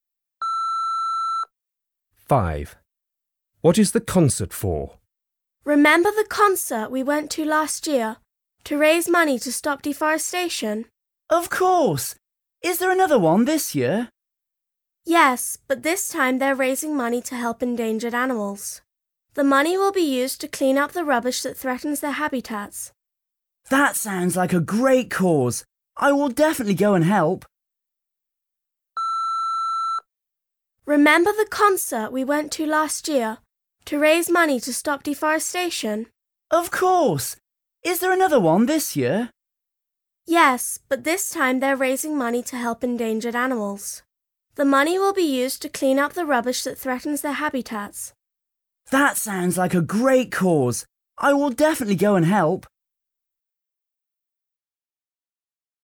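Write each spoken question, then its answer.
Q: What is the concert for?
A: To raise money to help endangered animals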